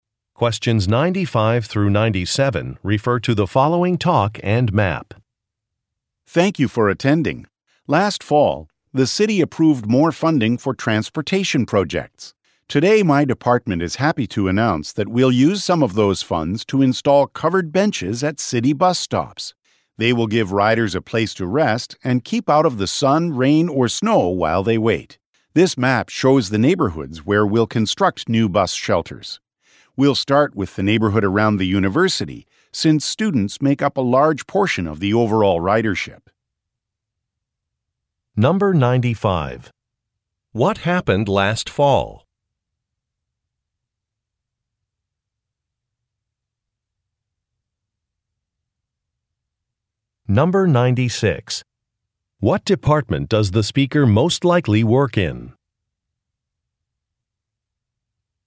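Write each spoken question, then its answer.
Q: What happened last fall?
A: The city approved more funding for transportation projects.

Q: What department does the speaker most likely work in?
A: Transportation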